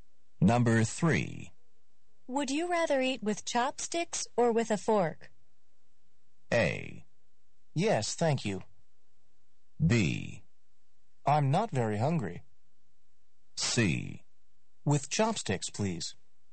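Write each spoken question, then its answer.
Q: Would you rather eat with chopsticks or with a fork?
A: C: With chopsticks, please.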